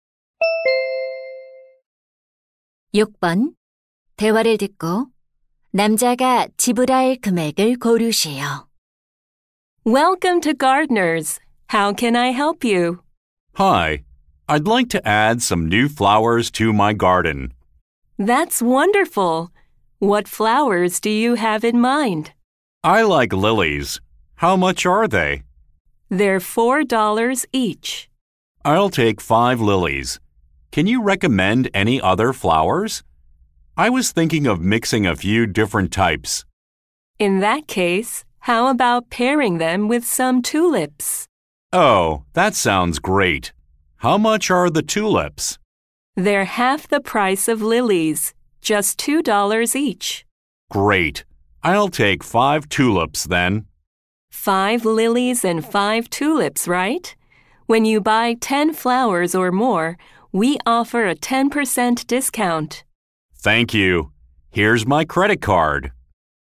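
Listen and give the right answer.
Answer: $27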